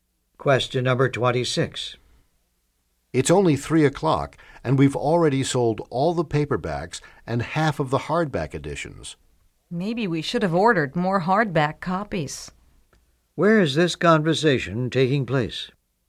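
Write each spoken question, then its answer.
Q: Where is this conversation taking place?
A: In a bookstore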